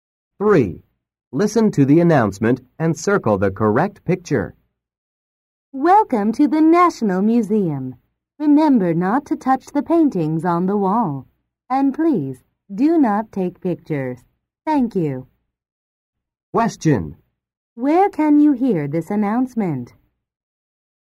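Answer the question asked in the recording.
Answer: At the National Museum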